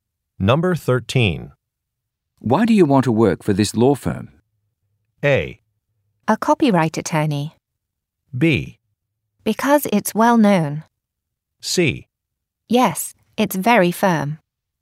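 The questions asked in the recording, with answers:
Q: Why do you want to work for this law firm?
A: B: Because it's well known.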